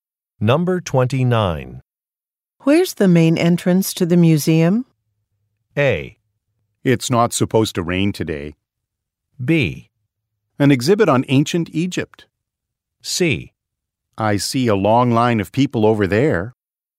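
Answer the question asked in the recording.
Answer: C: I see a long line of people over there.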